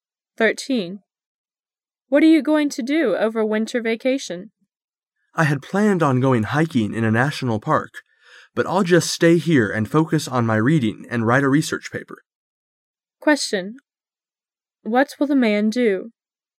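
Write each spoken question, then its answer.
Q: What will the man do?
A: Stay here, read and write a research paper.

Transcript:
[解析] W: What are you going to do over winter vocation? M: I had planned on going hiking in a National Park, but I'll just stay here and focus on my reading and write a research paper. Q: What will the man do?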